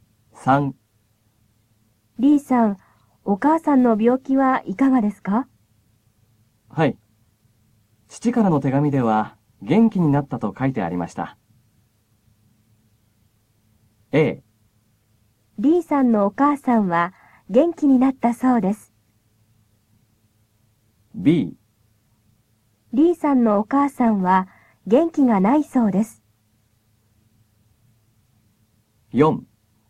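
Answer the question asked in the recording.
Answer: A: リーさんのお母さんは、元気になったそうです。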